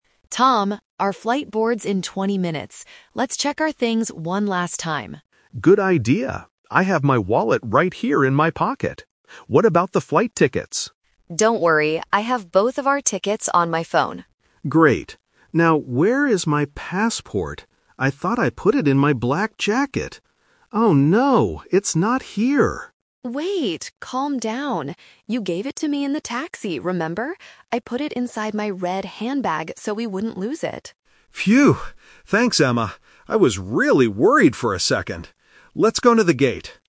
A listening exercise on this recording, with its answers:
Listen to the conversation between a husband and wife at the airport and choose the correct answer (A, B, or C).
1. Where are the flight tickets?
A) In Tom's pocket.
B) On Emma's phone.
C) In the black jacket.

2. Where is Tom's passport now?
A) In his black jacket.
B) In the taxi.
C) In Emma's red handbag.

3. What does Tom have in his pocket?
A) His phone.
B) His wallet.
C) His passport.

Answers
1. B
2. C
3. B

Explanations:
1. Emma says clearly, "I have both of our tickets on my phone." Option (A) is the trap because Tom's pocket has his wallet, not the tickets. Option (C) is where Tom thought his passport was.
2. This uses "The Twist" technique. Tom thought the passport was in his "black jacket" (Option A - The Trap), but Emma says she put it "inside my red handbag." Option (B) is also a trap because the taxi is just the place where he gave it to her, but the passport is no longer there.
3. At the beginning of the conversation, Tom says, "I have my wallet right here in my pocket." Option (A) is not mentioned for Tom (Emma is the one using a phone). Option (C) is a trap because he lost his passport.

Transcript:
Emma: Tom, our flight boards in twenty minutes. Let's check our things one last time.
Tom: Good idea. I have my wallet right here in my pocket. What about the flight tickets?
Emma: Don't worry, I have both of our tickets on my phone.
Tom: Great. Now, where is my passport? I thought I put it in my black jacket. Oh no, it's not here!
Emma: Wait, calm down! You gave it to me in the taxi, remember? I put it inside my red handbag so we wouldn't lose it.
Tom: Phew! Thanks, Emma. I was really worried for a second. Let's go to the gate.

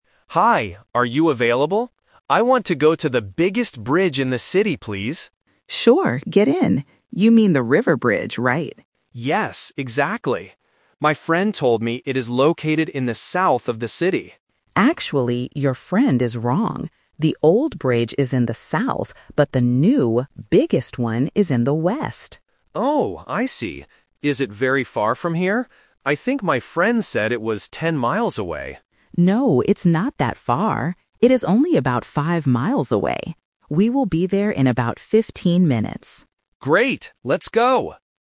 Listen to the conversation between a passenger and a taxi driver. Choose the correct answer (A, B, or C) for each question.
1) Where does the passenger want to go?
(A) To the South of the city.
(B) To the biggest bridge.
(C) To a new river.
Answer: B

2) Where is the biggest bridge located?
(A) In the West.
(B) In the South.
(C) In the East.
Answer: A

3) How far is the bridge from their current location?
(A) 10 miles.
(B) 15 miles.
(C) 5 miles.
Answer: C

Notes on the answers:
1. Why B is correct: The passenger says right at the beginning: "I want to go to the biggest bridge in the city, please." Why A is a trap: The passenger mentions the South later, but that is where he thought the bridge was, not his actual destination. Why C is wrong: They mention the name "River Bridge," but he doesn't want to go to a "new river."
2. Why A is correct: The driver corrects the passenger's mistake by saying, "the new, biggest one is in the West." Why B is a trap: The South is mentioned, but the driver explicitly says, "The old bridge is in the South" and that the passenger's friend was wrong. Why C is wrong: The East is never mentioned in the audio.
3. Why C is correct: The driver clearly states the distance: "It is only about 5 miles away." Why A is a trap: "10 miles" is what the passenger guessed based on what his friend said, but the driver rejects this. Why B is a trap: "15" is mentioned, but it refers to the time (fifteen minutes), not the distance in miles.

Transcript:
Passenger: Hi! Are you available? I want to go to the biggest bridge in the city, please.
Driver: Sure, get in. You mean the River Bridge, right?
Passenger: Yes, exactly. My friend told me it is located in the South of the city.
Driver: Actually, your friend is wrong. The old bridge is in the South, but the new, biggest one is in the West.
Passenger: Oh, I see! Is it very far from here? I think my friend said it was 10 miles away.
Driver: No, it's not that far. It is only about 5 miles away. We will be there in about fifteen minutes.

